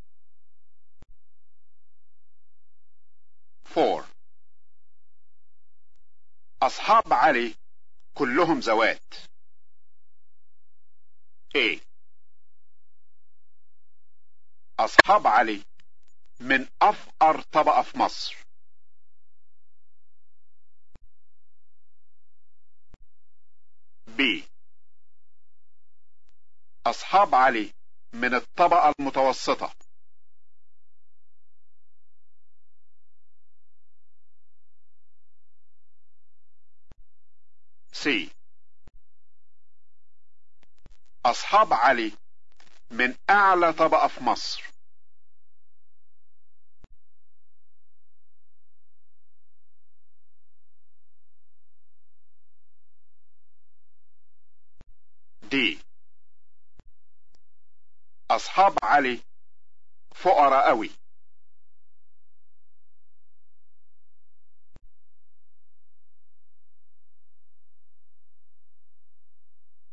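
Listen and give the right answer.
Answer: C: أصحاب علي من أعلى طبقة في مصر.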